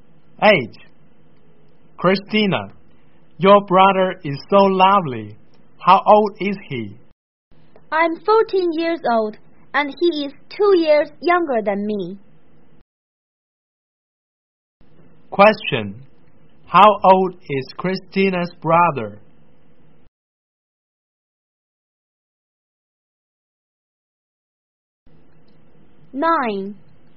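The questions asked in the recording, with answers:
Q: Question. How old is Christina's brother?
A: 12 years old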